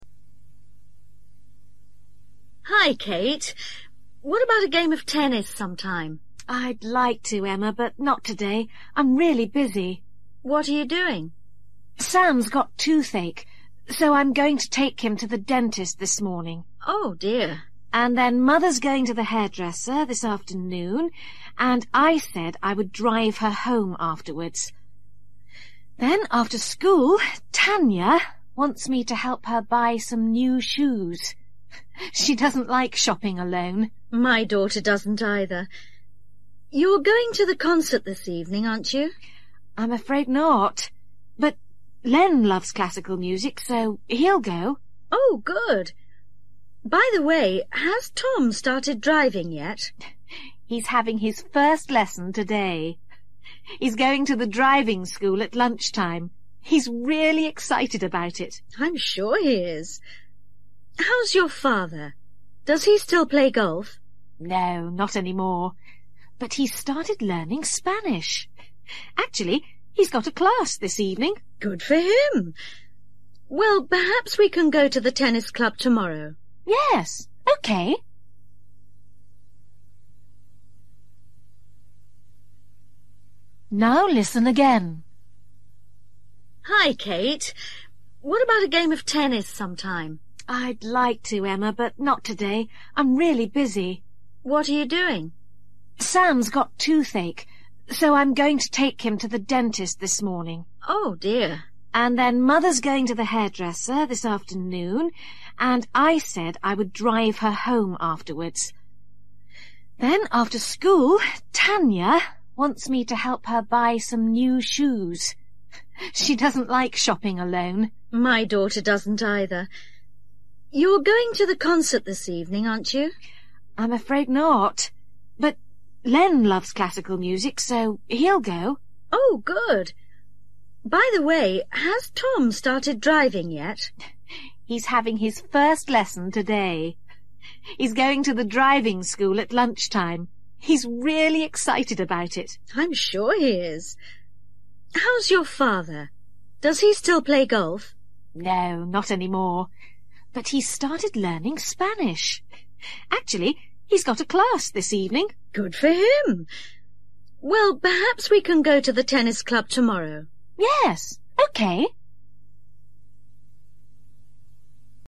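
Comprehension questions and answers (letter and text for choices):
For each question, choose the correct answer.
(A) concert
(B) dentist's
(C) driving school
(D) golf club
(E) hairdresser's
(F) shops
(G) Spanish class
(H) tennis club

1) Kate's mother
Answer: (E) hairdresser's

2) Tanya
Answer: (F) shops

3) Len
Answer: (A) concert

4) Tom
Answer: (C) driving school

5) Kate's father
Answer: (G) Spanish class

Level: Luyện nghe trình độ A2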